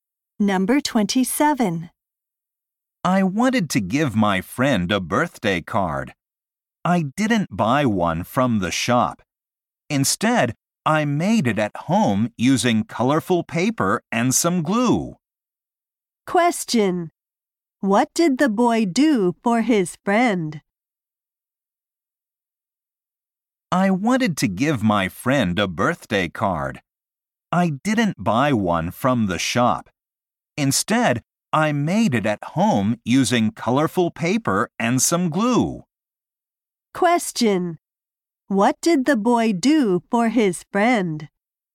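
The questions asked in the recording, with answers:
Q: What did the boy do for his friend?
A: He made a birthday card.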